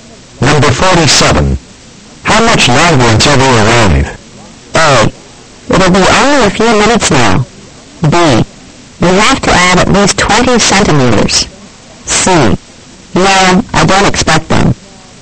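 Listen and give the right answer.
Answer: A: It'll be only a few minutes now.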